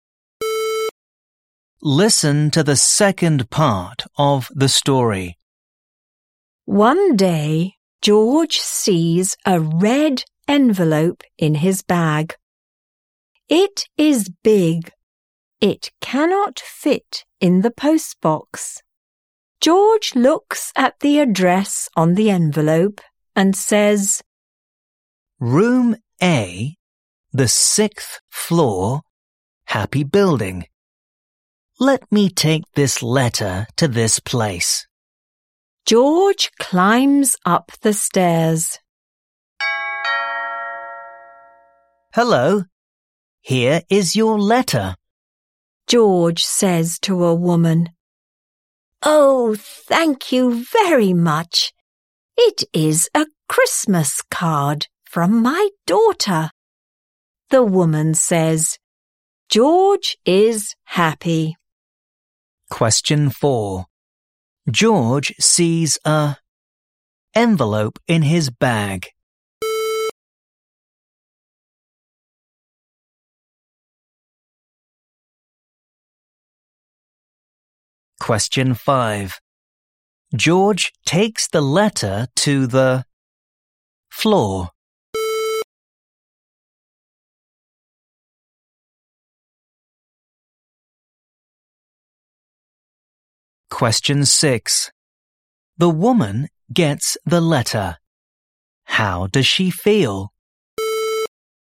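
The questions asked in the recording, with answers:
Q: George sees a envelope in his bag.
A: red

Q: George takes the letter to the floor.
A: 6th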